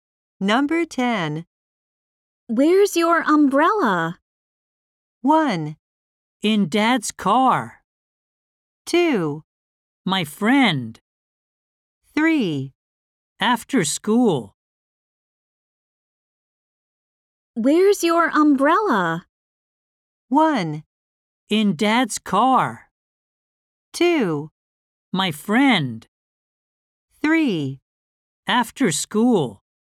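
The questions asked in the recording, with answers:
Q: Where's your umbrella?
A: 1: In Dad's car.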